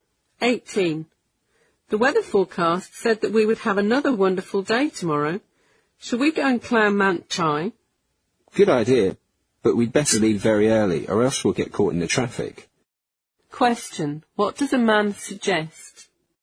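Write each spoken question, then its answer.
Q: What does a man suggest?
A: Leaving very early to avoid the traffic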